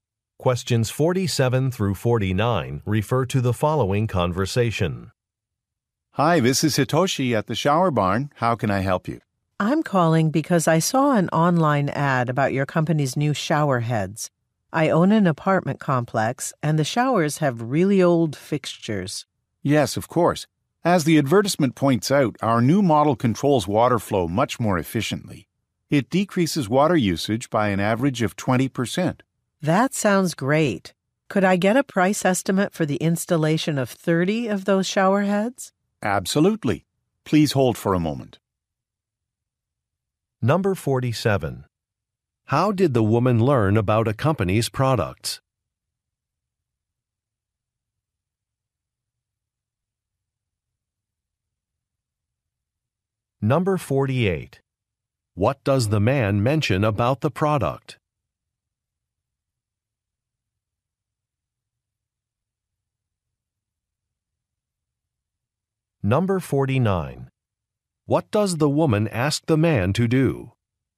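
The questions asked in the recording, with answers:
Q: How did the woman learn about a company's products?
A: From an online advertisement

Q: What does the man mention about the product?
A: It reduces water usage by about 20%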